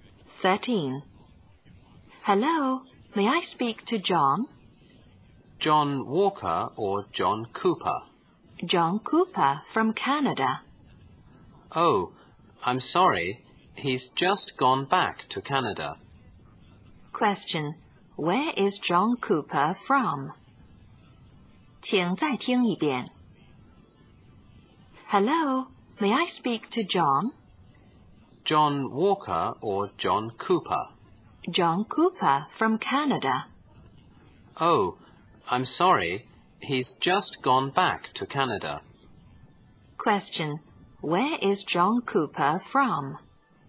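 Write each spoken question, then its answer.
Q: where is John Cooper from?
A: Canada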